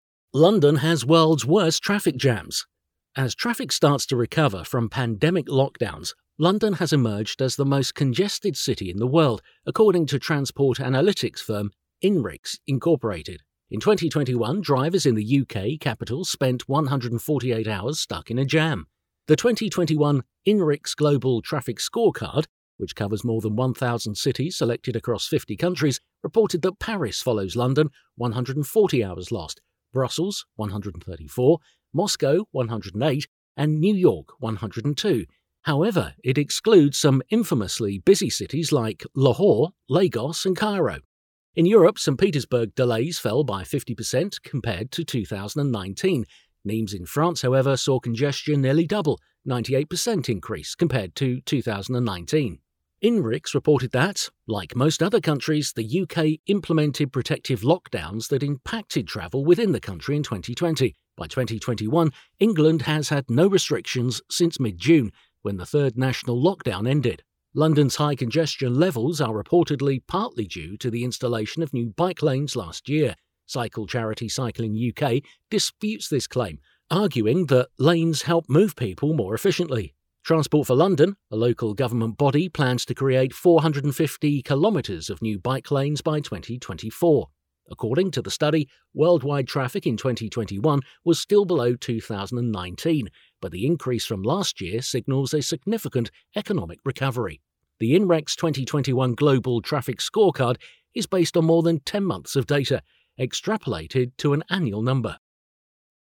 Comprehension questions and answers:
Decide if the statements are true or false.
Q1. Drivers in London spend more than 140 hours in traffic jams.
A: true

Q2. According to the article London is more congested than Cairo.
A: false

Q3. There has been no lockdown in the second half of the year in England.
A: true

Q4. It is clearly evident that bike lanes help people move more efficiently.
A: false

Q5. There has been an increase in worldwide traffic this year compared to last year.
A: true

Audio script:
As traffic starts to recover from pandemic lockdowns, London has emerged as the most congested city in the world, according to transport analytics firm Inrix Inc. In 2021, drivers in the UK capital spent 148 hours stuck in a jam.
The 2021 Inrix Global Traffic Scorecard, which covers more than 1,000 cities selected across 50 countries, reported that Paris follows London (140 hours lost), Brussels (134), Moscow (108) and New York (102). However, it excludes some infamously busy cities like Lahore, Lagos and Cairo.
In Europe, St Petersburg delays fell by 50% compared to 2019. Nimes in France, however, saw congestion nearly double (98% increase) compared to 2019.
Inrix reported that, like most other countries, the UK implemented protective lockdowns that impacted travel within the country in 2020. By 2021, England has had no restrictions since mid-June, when the third national lockdown ended.
London's high congestion levels are reportedly partly due to the installation of new bike lanes last year. Cycle charity Cycling UK disputes this claim, arguing that lanes help move people more efficiently. Transport for London, a local government body, plans to create 450km of new bike lanes by 2024.
According to the study, worldwide traffic in 2021 was still below 2019, but the increase from last year signals a significant economic recovery.
The Inrex 2021 Global Traffic Scorecard is based on more than ten months of data, extrapolated to an annual number.

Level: b1, b2